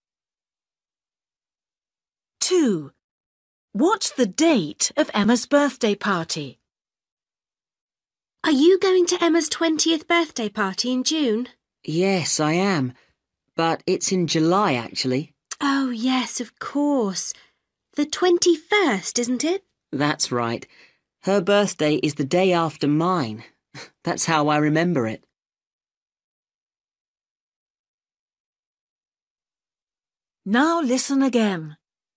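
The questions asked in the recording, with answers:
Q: What's the date of Emma's birthday party?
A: 21st July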